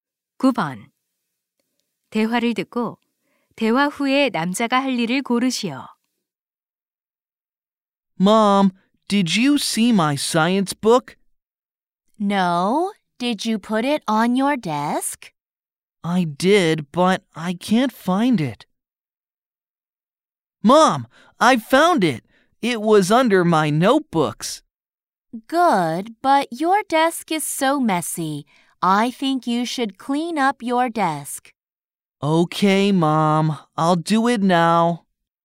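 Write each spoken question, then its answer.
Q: 대화를 듣고 대화 후에 남자가 할 일을 고르시오.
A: 책상 청소하기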